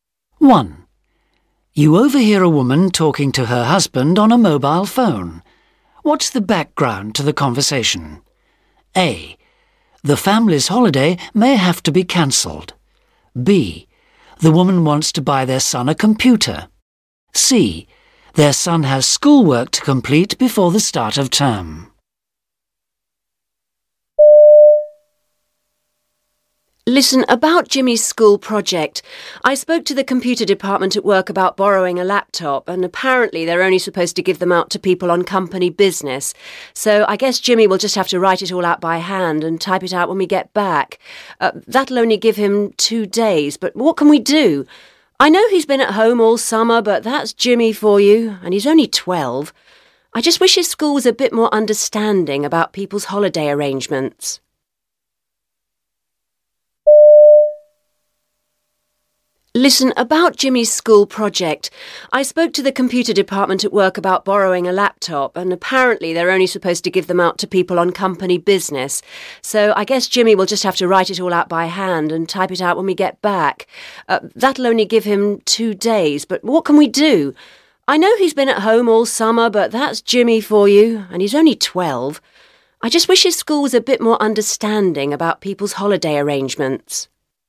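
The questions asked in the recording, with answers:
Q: What's the background to the conversation?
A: C: Their son has schoolwork to complete before the start of term.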